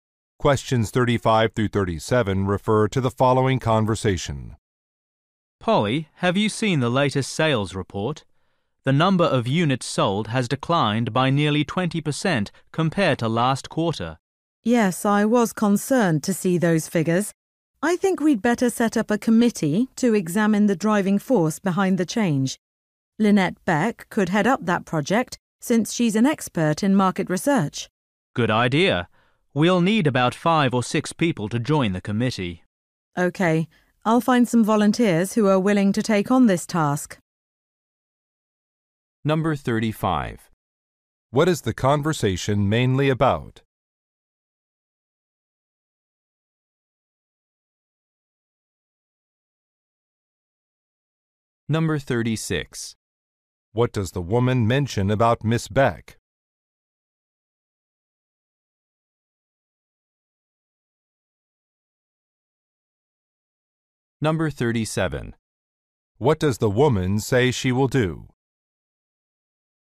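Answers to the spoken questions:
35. A decline in sales
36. She is an expert in market research
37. Find volunteers for the committee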